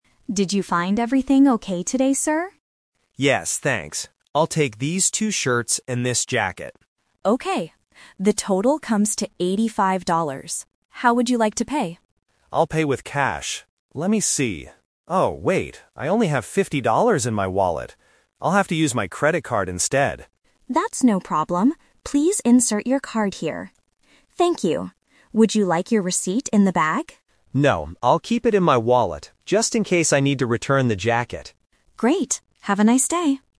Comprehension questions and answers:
Listen to the conversation between a customer and a cashier. Choose the correct answer (A, B, or C).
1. How much does the customer have to pay?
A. $50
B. $85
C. $100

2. How does the customer finally pay for his clothes?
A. With cash.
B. With a mobile phone.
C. With a credit card.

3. Where does the customer want to put his receipt?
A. In his wallet.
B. In the shopping bag.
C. In his jacket pocket.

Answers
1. B. $85
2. C. With a credit card.
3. A. In his wallet.

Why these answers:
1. Sarah the cashier says, "The total comes to eighty-five dollars." Option (A) is the trap; $50 is the amount of money David has in his wallet, not the total price. Option (C) is a plausible number but is not mentioned in the audio.
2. This question uses the "Twist" technique. David initially says he will pay with cash (Option A). However, he doesn't have enough money, so he changes his mind: "I'll have to use my credit card instead." Option (B) is a common payment method but is not mentioned.
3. David says, "I'll keep it in my wallet..." Option (B) is the trap; the cashier asks if he wants the receipt in the bag, but he says "No." Option (C) is a trap using the word "jacket" which he bought, but he doesn't put the receipt there.

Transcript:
Sarah: Did you find everything okay today, sir?
David: Yes, thanks. I'll take these two shirts and this jacket.
Sarah: Okay. The total comes to eighty-five dollars. How would you like to pay?
David: I'll pay with cash. Let me see... oh wait. I only have fifty dollars in my wallet. I'll have to use my credit card instead.
Sarah: That's no problem. Please insert your card here. Thank you. Would you like your receipt in the bag?
David: No, I'll keep it in my wallet, just in case I need to return the jacket.

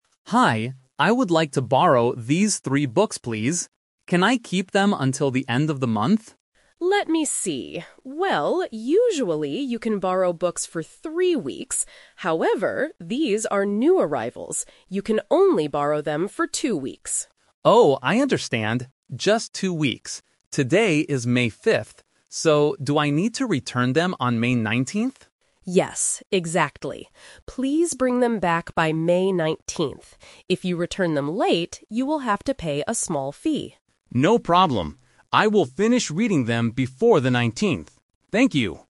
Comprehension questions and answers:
Listen to a conversation between a man and a librarian. Choose the correct answer A, B, or C.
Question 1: How long can the man keep the books?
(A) For two weeks.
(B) For three weeks.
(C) Until the end of the month.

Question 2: Why is the borrowing time shorter than usual?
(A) Because he is borrowing three books.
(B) Because the books are new arrivals.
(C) Because he has to pay a fee.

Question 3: What is the exact date he must return the books?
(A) May 5th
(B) May 9th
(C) May 19th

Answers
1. (A) For two weeks.
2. (B) Because the books are new arrivals.
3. (C) May 19th

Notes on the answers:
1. The librarian says, "You can only borrow them for two weeks."
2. The librarian explains the rule exception by saying, "However, these are new arrivals."
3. The man calculates the date and asks, "So, do I need to return them on May 19th?" and the librarian confirms, "Yes, exactly."

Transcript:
Man: Hi, I would like to borrow these three books, please. Can I keep them until the end of the month?
Librarian: Let me see. Well, usually you can borrow books for three weeks. However, these are new arrivals. You can only borrow them for two weeks.
Man: Oh, I understand. Just two weeks. Today is May 5th. So, do I need to return them on May 19th?
Librarian: Yes, exactly. Please bring them back by May 19th. If you return them late, you will have to pay a small fee.

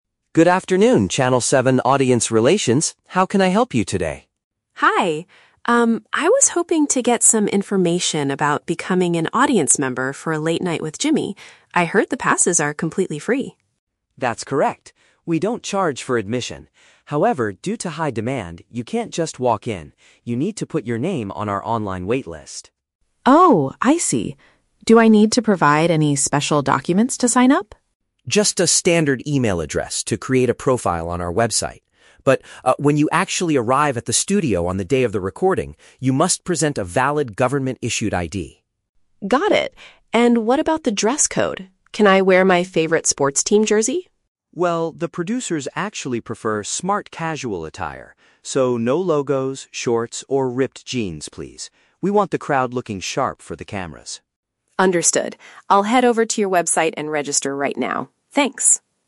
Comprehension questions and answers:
Listen to a telephone conversation between a fan and a TV station employee. Choose the correct answer (A, B, or C) for each question.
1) How do people secure a seat for the show?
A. By purchasing an admission pass at the studio entrance.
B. By calling the television network several weeks in advance.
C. By adding their name to an internet-based queue.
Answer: C. By adding their name to an internet-based queue.

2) What is required when attending the live recording at the studio?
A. Logging into an email account on a mobile device.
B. Providing an official document that proves who you are.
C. Showing a printed copy of the confirmation message.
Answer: B. Providing an official document that proves who you are.

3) What does the staff member say about clothing?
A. Guests must wear formal suits and evening dresses.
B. Guests are welcome to show support by wearing team shirts.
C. Guests should choose neat, unbranded outfits.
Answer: C. Guests should choose neat, unbranded outfits.

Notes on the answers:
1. Mark states that people need to "put your name on our online waitlist". Option C perfectly paraphrases this (internet-based = online; queue = waitlist). Option A is the Trap: The audio mentions "admission", but Mark explicitly says they "don't charge" (it is free), so you cannot purchase a pass. Option B is a plausible real-life action but is not mentioned in the audio.
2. Mark tells Emily that when she arrives at the studio, she "must present a valid government-issued ID". Option B uses synonyms to express this requirement. Option A is the Trap: "Email" and "create a profile" are mentioned, but that is only for signing up at home, not what you do at the studio. Option C is plausible but never mentioned.
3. Mark says the producers prefer "smart casual attire" (neat) and specifically asks for "no logos" (unbranded). Option C matches this description. Option B is the Trap: Emily asks if she can wear

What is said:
Mark: Good afternoon, Channel 7 audience relations. How can I help you today?
Emily: Hi! Um, I was hoping to get some information about becoming an audience member for Late Night with Jimmy. I heard the passes are completely free.
Mark: That's correct. We don't charge for admission. However, due to high demand, you can't just walk in. You need to put your name on our online waitlist.
Emily: Oh, I see. Do I need to provide any special documents to sign up?
Mark: Just a standard email address to create a profile on our website. But, ah, when you actually arrive at the studio on the day of the recording, you must present a valid government-issued ID.
Emily: Got it. And what about the dress code? Can I wear my favorite sports team jersey?
Mark: Well, the producers actually prefer smart casual attire. So, no logos, shorts, or ripped jeans, please. We want the crowd looking sharp for the cameras.

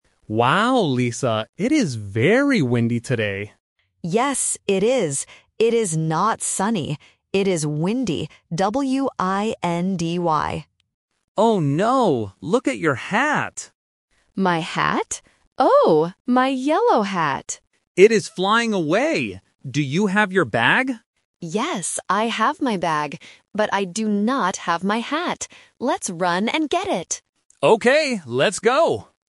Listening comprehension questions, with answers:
Listen to the conversation in the park. Circle the correct answer (A, B, or C).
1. What is the weather like today?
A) Sunny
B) Windy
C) Raining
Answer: B) Windy

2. What is flying away?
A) A bag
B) A hat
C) A book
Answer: B) A hat

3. What color is the hat?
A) Yellow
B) Red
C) Blue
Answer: A) Yellow

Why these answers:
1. The Key: Mark says, "It is very windy today!" and Lisa spells the word: "W-I-N-D-Y." The Trap: Option (A) "Sunny" is mentioned in the audio, but Lisa explicitly says, "It is not sunny." Not Mentioned: Option (C) "Raining" is never mentioned.
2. The Key: Mark says, "Look at your hat!" and Lisa cries out because she lost it. The Trap: Option (A) "A bag" is a word in the conversation, but Lisa says, "I have my bag," meaning it is not the item flying away. Not Mentioned: Option (C) "A book" is completely new information.
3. The Key: Lisa clearly states the color of her item: "Oh, my yellow hat!" The Trap: Option (B) "Red" and Option (C) "Blue" are common colors used to test vocabulary, but they are not in the audio.

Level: A1

